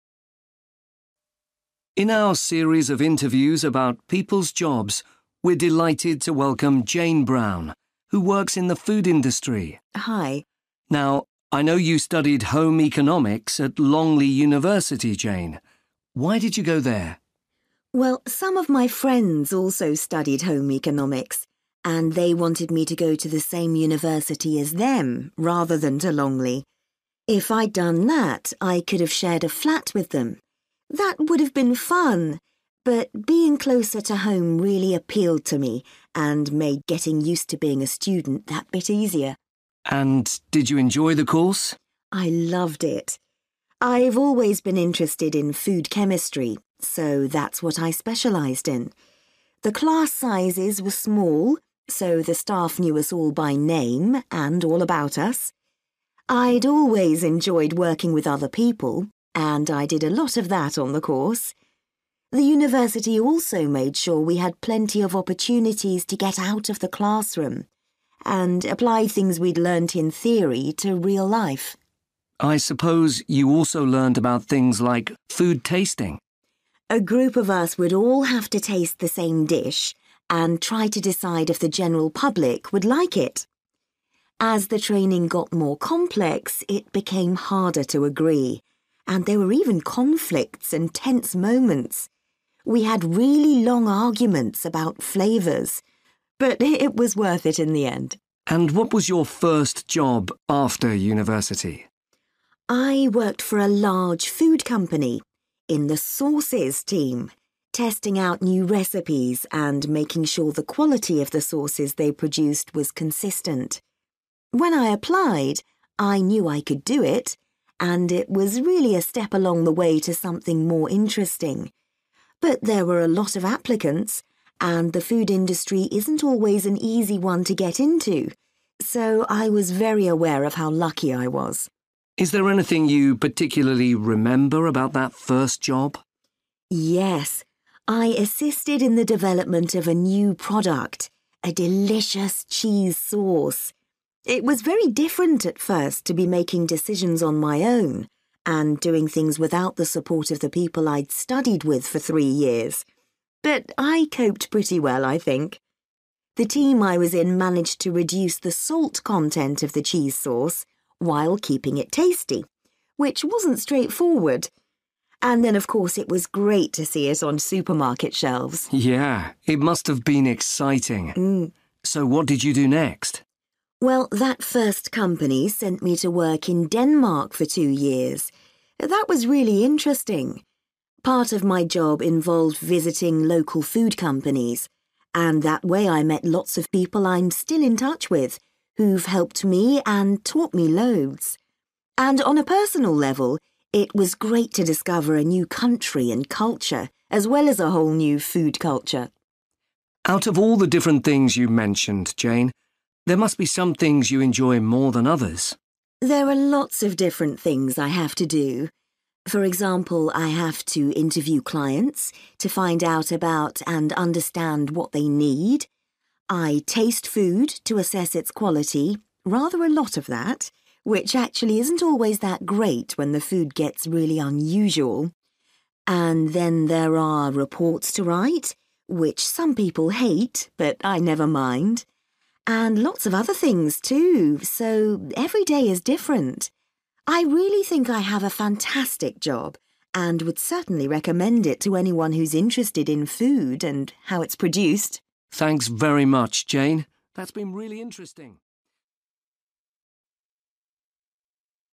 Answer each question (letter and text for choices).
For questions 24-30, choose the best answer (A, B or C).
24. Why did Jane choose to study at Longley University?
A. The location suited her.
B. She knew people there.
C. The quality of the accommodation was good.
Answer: A. The location suited her.

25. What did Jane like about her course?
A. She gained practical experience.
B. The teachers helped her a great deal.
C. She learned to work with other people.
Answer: A. She gained practical experience.

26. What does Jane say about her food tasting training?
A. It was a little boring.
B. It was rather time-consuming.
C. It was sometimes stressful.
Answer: C. It was sometimes stressful.

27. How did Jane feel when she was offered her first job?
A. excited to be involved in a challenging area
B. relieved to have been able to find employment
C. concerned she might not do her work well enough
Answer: B. relieved to have been able to find employment

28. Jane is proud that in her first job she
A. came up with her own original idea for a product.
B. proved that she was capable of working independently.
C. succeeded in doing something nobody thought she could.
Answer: B. proved that she was capable of working independently.

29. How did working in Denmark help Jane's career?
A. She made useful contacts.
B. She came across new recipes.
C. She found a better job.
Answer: A. She made useful contacts.

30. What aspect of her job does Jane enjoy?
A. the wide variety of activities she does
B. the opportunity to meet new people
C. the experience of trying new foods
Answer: A. the wide variety of activities she does

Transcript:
Interviewer: In our series of interviews about people's jobs, we're delighted to welcome Jane Brown, who works in the food industry.
Jane: Hi!
Interviewer: Now I know you studied home economics at Longley University, Jane. Why did you go there?
Jane: Well some of my friends also studied home economics, and they wanted me to go to the same university as them rather than to Longley. If I'd done that, I could have shared a flat with them – that would've been fun but being closer to home really appealed to me and made getting used to being a student that bit easier.
Interviewer: And did you enjoy the course?
Jane: I loved it! I've always been interested in food chemistry, so that's what I specialised in. The class sizes were small so the staff knew us all by name and all about us. I'd always enjoyed working with other people, and I did a lot of that on the course. The university also made sure we had plenty of opportunities to get out of the classroom and apply things we'd learnt in theory to real life.
Interviewer: I suppose you also learned about things like food tasting?
Jane: A group of us would all have to taste the same dish and try to decide if the general public would like it. As the training got more complex it became harder to agree, and there were even conflicts and tense moments. We had really long arguments about flavours, but it was worth it in the end.
Interviewer: And what was your first job after university?
Jane: I worked for a large food company, in the sauces team, testing out new recipes and making sure the quality of the sauces they produced was consistent. When I applied, I knew I could do it, and it was really a step along the way to something more interesting. But there were a lot of applicants and the food industry isn't always an easy one to get into, so I was very aware of how lucky I was.
Interviewer: Is there anything you particularly remember about that first job?
Jane: Yes, I assisted in the development of a new product, a delicious cheese sauce! It was very different at first to be making decisions on my own and doing things without the support of the people I'd studied with for three years, but I coped pretty well, I think. The team I was in managed to reduce the salt content of the cheese sauce while keeping it tasty, which wasn't straightforward. And then of course it was great to see it on supermarket shelves!
Interviewer: Yeah, it must have been exciting! So what did you do next?
Jane: Well that first company sent me to work in Denmark for two years. That was really interesting. Part of my job involved visiting local food companies, and that way I met lots of people I'm still in touch with who've helped me and taught me loads. And on a personal level, it was great to discover a new country and culture, as well as a whole new food culture.
Interviewer: Out of all the different things you mentioned Jane, there must be some things you enjoy more than others?
Jane: There are lots of different things I have to do. For example I have to interview clients, to find out about and understand what they need; I taste food to assess its quality – rather a lot of that, which actually isn't always that great when the food gets really unusual! And then there are reports to write, which some people hate but I never mind. And lots of other things too, so every day is different. I really think I have a fantastic job and would certainly recommend it to anyone who's interested in food and how it's produced.
Interviewer: Thanks very much, Jane, that's been really interesting ...

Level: B2